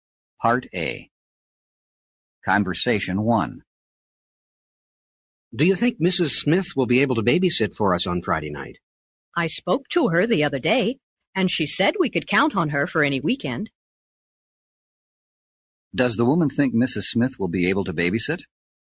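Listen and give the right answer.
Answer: Yes, she can count on her for any weekend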